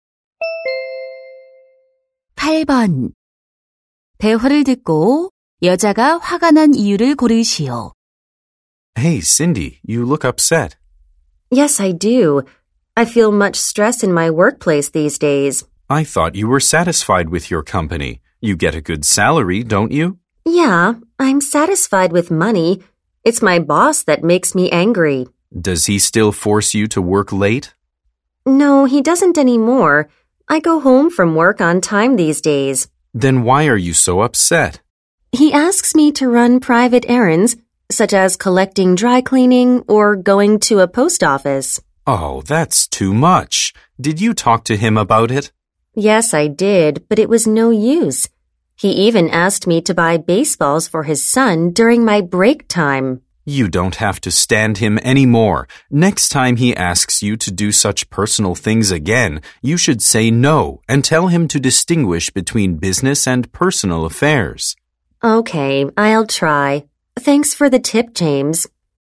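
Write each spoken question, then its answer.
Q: 대화를 듣고 여자가 화가 난 이유를 고르시오.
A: 상사가 개인적인 심부름을 시켜서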